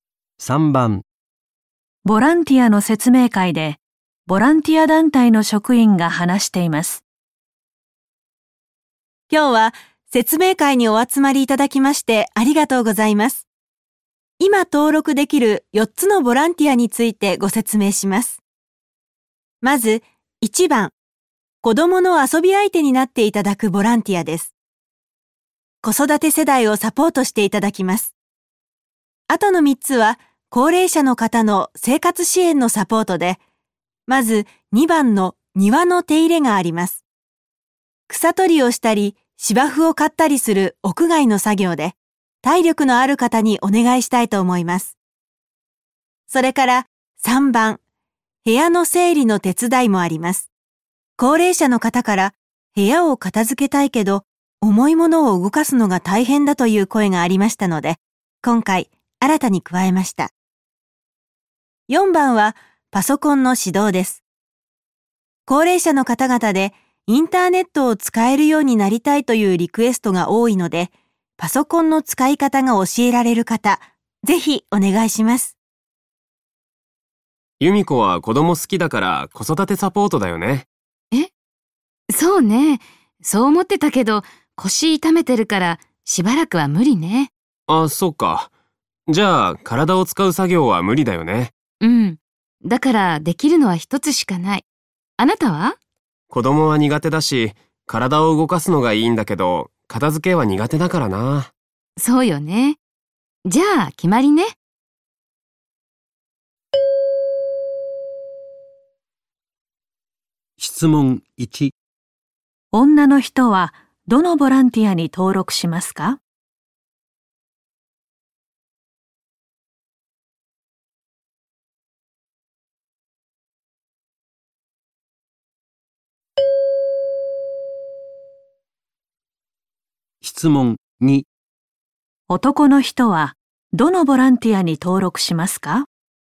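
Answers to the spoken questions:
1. パソコンの指導
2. 庭の手入れ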